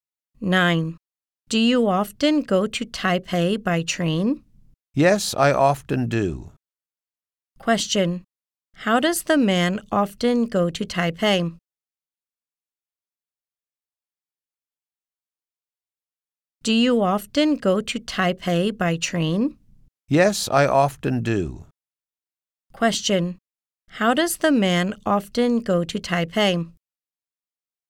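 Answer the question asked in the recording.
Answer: By train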